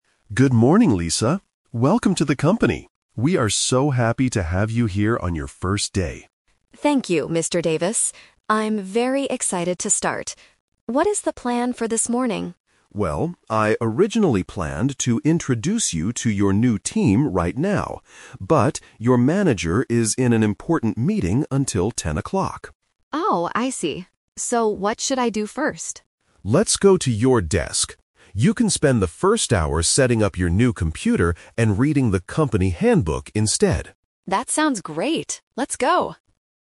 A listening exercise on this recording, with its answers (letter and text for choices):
Listen to a conversation between an HR Manager and a new employee. For each question, choose the correct answer (A, B, or C).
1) Why is Lisa at the company today?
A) To have a job interview.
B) To start her first day of work.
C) To attend an important meeting.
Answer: B) To start her first day of work.

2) What is Lisa going to do first this morning?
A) Meet her new team.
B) Set up her new computer.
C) Talk to her manager.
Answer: B) Set up her new computer.

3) Why did the morning schedule change?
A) Because Lisa was late for work.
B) Because her computer was broken.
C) Because the manager is busy.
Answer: C) Because the manager is busy.

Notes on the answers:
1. Mr. Davis clearly says, "We are so happy to have you here on your first day." This means she is starting her job (Option B - Key). Option A is a logical guess for an office setting but is not mentioned. Option C is a trap because the manager is in a meeting, not Lisa.
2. Mr. Davis says he "originally planned" to introduce her to the team (Option A - Trap). However, he changes the plan and tells her to "spend the first hour setting up your new computer... instead" (Option B - Key). Option C is wrong because the manager is not available yet.
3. The schedule changed because "your manager is in an important meeting," which means the manager is busy (Option C - Key). Option A is not mentioned (Lisa is not late). Option B is a distractor; she needs to set up the computer, but it is not broken.

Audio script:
Mr. Davis: Good morning, Lisa! Welcome to the company. We are so happy to have you here on your first day.
Lisa: Thank you, Mr. Davis. I'm very excited to start. What is the plan for this morning?
Mr. Davis: Well, I originally planned to introduce you to your new team right now. But, your manager is in an important meeting until 10 o'clock.
Lisa: Oh, I see. So what should I do first?
Mr. Davis: Let's go to your desk. You can spend the first hour setting up your new computer and reading the company handbook instead.
Lisa: That sounds great. Let's go!